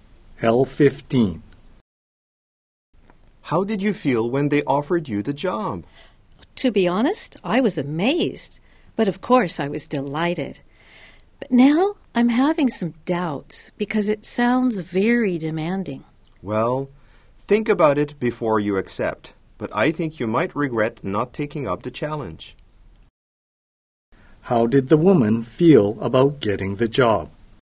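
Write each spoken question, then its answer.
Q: How did the woman feel about getting the job?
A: Amazed and delighted, but now doubtful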